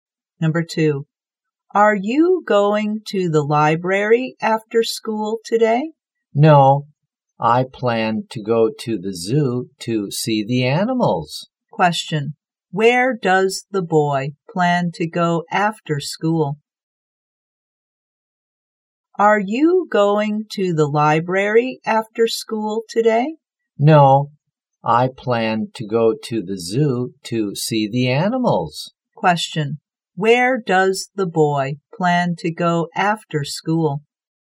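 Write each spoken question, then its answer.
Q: Where does the boy plan to go after school?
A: The zoo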